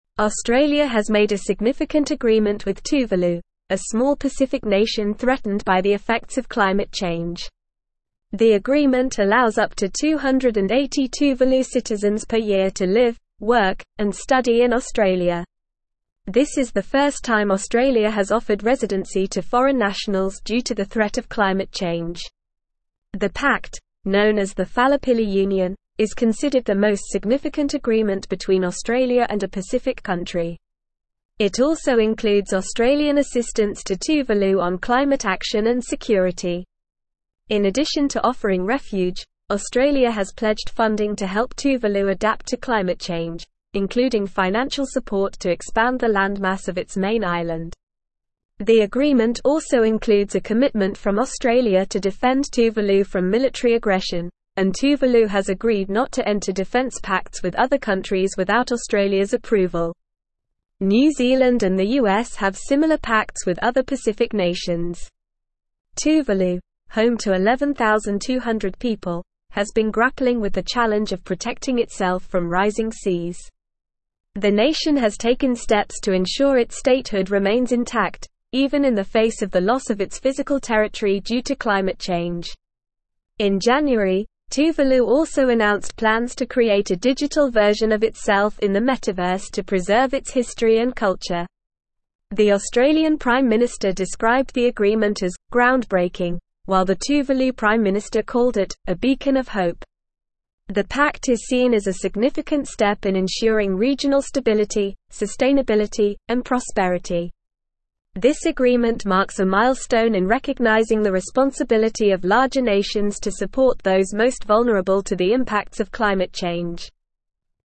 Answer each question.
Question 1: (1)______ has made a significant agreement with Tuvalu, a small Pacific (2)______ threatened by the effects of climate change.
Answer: Australia

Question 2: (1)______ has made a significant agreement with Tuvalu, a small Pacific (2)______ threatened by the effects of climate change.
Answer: nation

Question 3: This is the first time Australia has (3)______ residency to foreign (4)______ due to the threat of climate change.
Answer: offered

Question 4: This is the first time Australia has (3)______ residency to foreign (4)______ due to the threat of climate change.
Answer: nationals

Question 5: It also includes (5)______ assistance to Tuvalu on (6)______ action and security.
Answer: Australian

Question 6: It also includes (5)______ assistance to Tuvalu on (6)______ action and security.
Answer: climate

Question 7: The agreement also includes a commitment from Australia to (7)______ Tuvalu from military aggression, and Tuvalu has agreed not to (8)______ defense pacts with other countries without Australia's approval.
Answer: defend

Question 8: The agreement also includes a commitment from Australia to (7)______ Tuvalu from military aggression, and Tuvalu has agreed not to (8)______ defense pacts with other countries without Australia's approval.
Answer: enter

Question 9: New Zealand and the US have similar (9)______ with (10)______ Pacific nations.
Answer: pacts

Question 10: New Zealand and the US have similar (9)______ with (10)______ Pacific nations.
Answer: other

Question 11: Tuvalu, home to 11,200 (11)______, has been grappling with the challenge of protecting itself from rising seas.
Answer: people

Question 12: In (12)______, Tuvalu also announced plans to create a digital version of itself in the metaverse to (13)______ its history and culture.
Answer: January

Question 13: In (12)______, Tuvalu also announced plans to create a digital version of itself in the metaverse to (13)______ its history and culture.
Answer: preserve

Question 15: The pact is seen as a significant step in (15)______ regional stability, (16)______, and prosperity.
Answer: ensuring

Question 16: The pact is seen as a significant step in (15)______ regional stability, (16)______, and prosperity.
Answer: sustainability

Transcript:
Australia has made a significant agreement with Tuvalu, a small Pacific nation threatened by the effects of climate change. The agreement allows up to 280 Tuvalu citizens per year to live, work, and study in Australia. This is the first time Australia has offered residency to foreign nationals due to the threat of climate change. The pact, known as the Falepili Union, is considered the most significant agreement between Australia and a Pacific country. It also includes Australian assistance to Tuvalu on climate action and security.
In addition to offering refuge, Australia has pledged funding to help Tuvalu adapt to climate change, including financial support to expand the landmass of its main island. The agreement also includes a commitment from Australia to defend Tuvalu from military aggression, and Tuvalu has agreed not to enter defense pacts with other countries without Australia's approval. New Zealand and the US have similar pacts with other Pacific nations.
Tuvalu, home to 11,200 people, has been grappling with the challenge of protecting itself from rising seas. The nation has taken steps to ensure its statehood remains intact, even in the face of the loss of its physical territory due to climate change. In January, Tuvalu also announced plans to create a digital version of itself in the metaverse to preserve its history and culture.
The Australian Prime Minister described the agreement as "ground-breaking," while the Tuvalu Prime Minister called it "a beacon of hope." The pact is seen as a significant step in ensuring regional stability, sustainability, and prosperity. This agreement marks a milestone in recognizing the responsibility of larger nations to support those most vulnerable to the impacts of climate change.

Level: Level 4